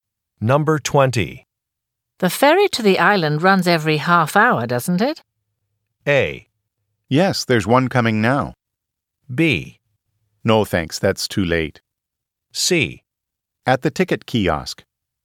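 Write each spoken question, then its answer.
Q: The ferry to the island runs every half hour, doesn't it?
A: A: Yes, there's one coming now.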